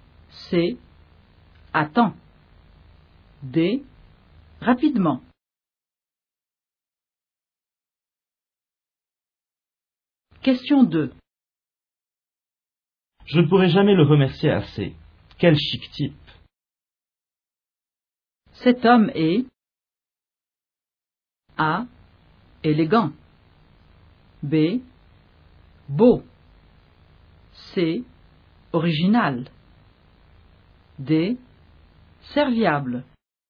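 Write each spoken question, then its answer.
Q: Cet homme est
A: D: Serviable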